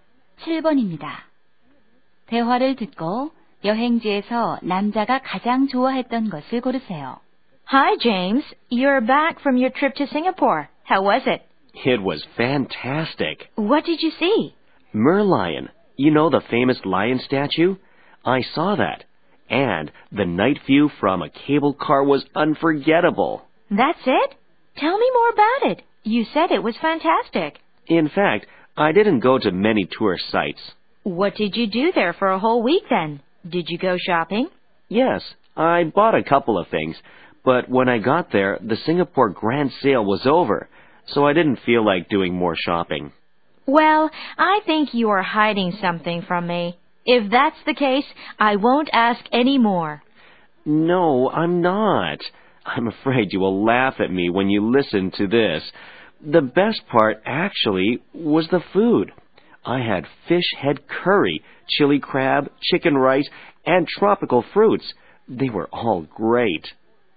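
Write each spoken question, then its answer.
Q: 대화를 듣고 여행지에서 남자가 가장 좋아했던 것을 고르세요.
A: 음식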